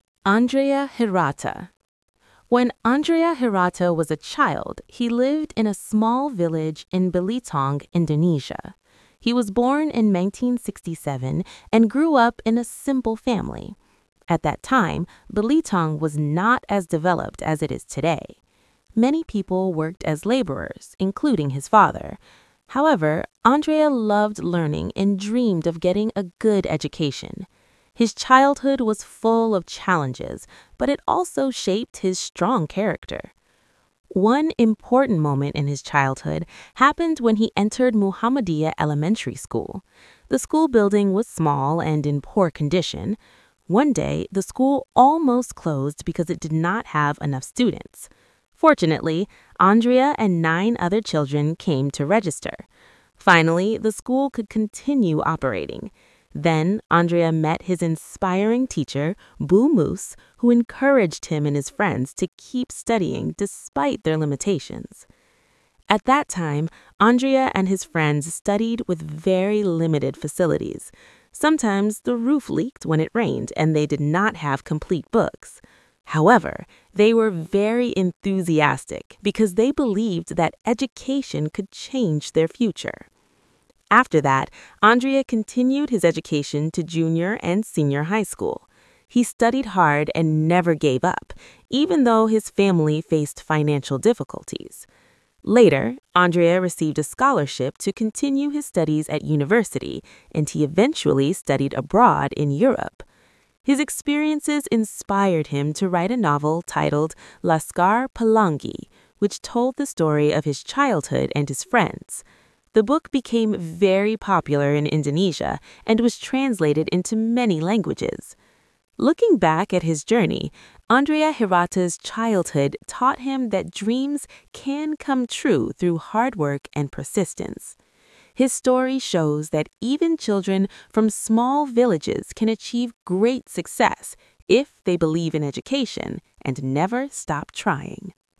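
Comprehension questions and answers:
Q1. Andrea Hirata was born in ______.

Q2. His father worked as a ______.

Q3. The school building was ______.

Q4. He received a ______ to study abroad.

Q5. His novel became very ______.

Students listen and decide whether the following statements are True or False.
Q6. Andrea Hirata grew up in Jakarta.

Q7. His school almost closed because there were not enough students.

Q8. His teacher encouraged him to study hard.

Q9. He stopped studying because of financial problems.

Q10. Laskar Pelangi tells about his childhood.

Students answer in complete sentences.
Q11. Where was Andrea Hirata born?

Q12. What problem did his school face?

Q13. Who inspired him during his school years?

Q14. What helped him continue his study?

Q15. Why did he write Laskar Pelangi?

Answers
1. 1967
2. laborer
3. small and in poor condition
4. scholarship
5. popular
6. False
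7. True
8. True
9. False
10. True
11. In a small village in Belitung, Indonesia.
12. It almost closed because it did not have enough students.
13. His teacher, Bu Mus.
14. A scholarship.
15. His childhood experiences inspired him.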